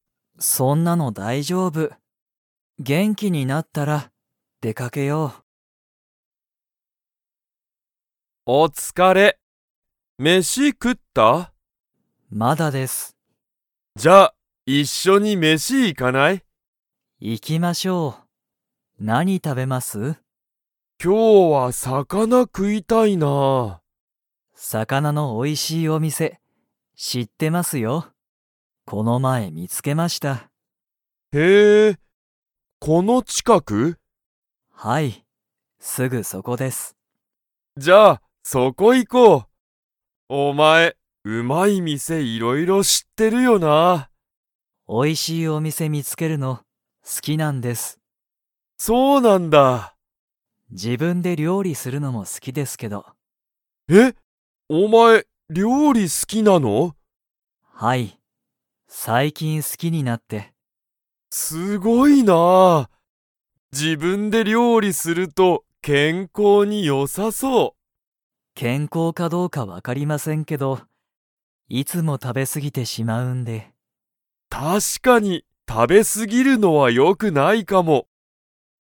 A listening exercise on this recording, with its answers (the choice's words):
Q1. 鈴木すずきさんは、うまい店みせをいろいろ知しっていますか?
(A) はい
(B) いいえ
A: はい

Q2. 鈴木すずきさんは が好すきだ。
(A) 料理りょうり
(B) 仕事しごと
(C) 音楽おんがく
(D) 自然しぜん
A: 料理りょうり